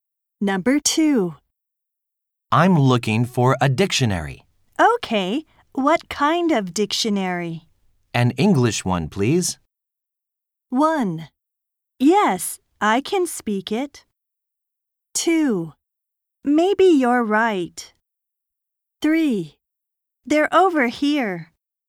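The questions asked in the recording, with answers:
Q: An English one, please.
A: 3: They're over here.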